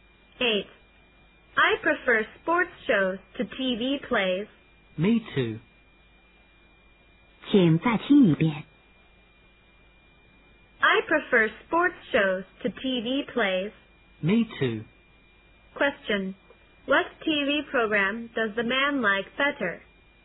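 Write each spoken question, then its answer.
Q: What TV program does the man like better?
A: Sports shows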